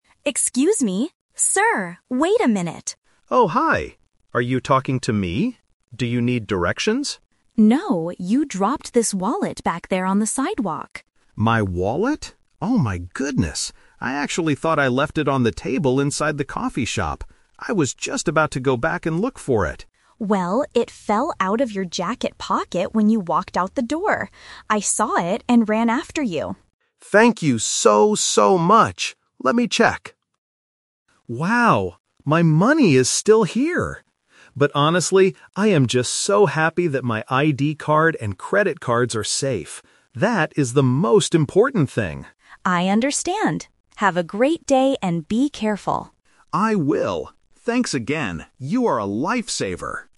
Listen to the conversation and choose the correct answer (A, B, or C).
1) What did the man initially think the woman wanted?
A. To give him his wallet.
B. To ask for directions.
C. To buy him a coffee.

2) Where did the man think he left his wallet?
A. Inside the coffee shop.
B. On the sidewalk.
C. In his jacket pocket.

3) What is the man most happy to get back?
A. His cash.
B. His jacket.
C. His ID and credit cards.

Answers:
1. B
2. A
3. C

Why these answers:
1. When the woman calls him, the man asks, "Do you need directions?" Trap: Option (A) is what the woman actually wanted, but not what the man initially thought. Option (C) is a trap because the word "coffee" is mentioned later, but she didn't want to buy him one.
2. The man explains his "Twist" thought: "I actually thought I left it on the table inside the coffee shop." Trap: Option (B) is where the wallet actually was (the reality). Option (C) is where the wallet fell from.
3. The man says, "I am just so happy that my ID card and credit cards are safe. That is the most important thing." Trap: Option (A) is a trap. He mentions that his money is there, but he says the ID and cards are "honestly... the most important thing". Option (B) is just the piece of clothing he was wearing.

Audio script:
Woman: Excuse me! Sir! Wait a minute!
Man: Oh, hi. Are you talking to me? Do you need directions?
Woman: No, you dropped this wallet back there on the sidewalk.
Man: My wallet? Oh my goodness! I actually thought I left it on the table inside the coffee shop. I was just about to go back and look for it.
Woman: Well, it fell out of your jacket pocket when you walked out the door. I saw it and ran after you.
Man: Thank you so, so much! Let me check... Wow, my money is still here. But honestly, I am just so happy that my ID card and credit cards are safe. That is the most important thing.
Woman: I understand. Have a great day and be careful!

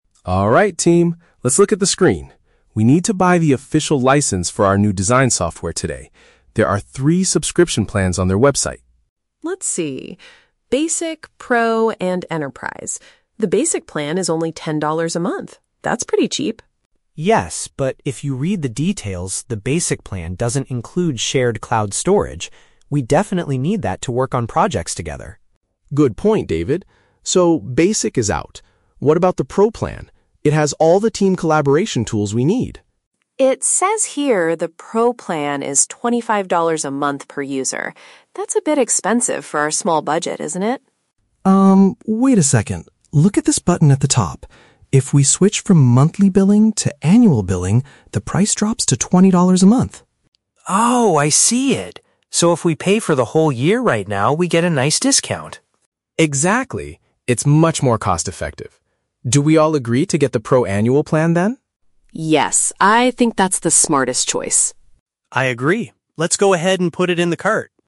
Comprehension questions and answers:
Listen to a conversation between a team leader and two designers about buying software. Choose the best answer (A, B, or C) for each question.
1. What is the main problem with the Basic plan?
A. It does not offer a specific feature the team requires.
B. It is currently too expensive for the team's small budget.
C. It does not allow users to pay for a full year in advance.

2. Why does Sarah initially worry about the Pro plan?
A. Because it is missing some important collaboration tools.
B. Because the monthly payment option seems too high.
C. Because the website is having trouble processing the payment.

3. How will the team save money on their purchase?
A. By choosing the cheapest software option available.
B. By waiting for a special holiday discount next month.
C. By paying for twelve months of service at one time.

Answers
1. A
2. B
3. C

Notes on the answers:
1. David points out that the Basic plan "doesn't include shared cloud storage" which they "definitely need." Option A paraphrases this as not offering "a specific feature the team requires."
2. Sarah notices the Pro plan is $25 a month and says, "That's a bit expensive for our small budget." Option B paraphrases this as the "monthly payment option seems too high."
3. Mark suggests switching to "annual billing" and David confirms that if they "pay for the whole year right now," they get a discount. Option C paraphrases this perfectly as "paying for twelve months of service at one time."

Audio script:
Mark: Alright, team, let's look at the screen. We need to buy the official license for our new design software today. There are three subscription plans on their website.
Sarah: Let's see... Basic, Pro, and Enterprise. The Basic plan is only ten dollars a month. That's pretty cheap.
David: Yes, but if you read the details, the Basic plan doesn't include shared cloud storage. We definitely need that to work on projects together.
Mark: Good point, David. So, Basic is out. What about the Pro plan? It has all the team collaboration tools we need.
Sarah: It says here the Pro plan is twenty-five dollars a month per user. That's a bit expensive for our small budget, isn't it?
Mark: Um, wait a second. Look at this button at the top. If we switch from "monthly billing" to "annual billing", the price drops to twenty dollars a month.
David: Oh, I see it! So if we pay for the whole year right now, we get a nice discount.
Mark: Exactly. It's much more cost-effective. Do we all agree to get the Pro annual plan then?
Sarah: Yes, I think that's the smartest choice.

